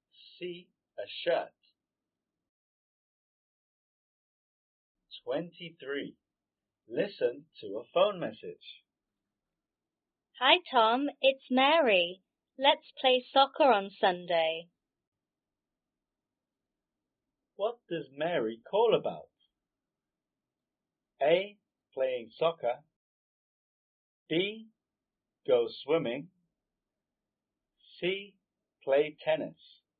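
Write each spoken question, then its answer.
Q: What does Mary call about?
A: A: Playing soccer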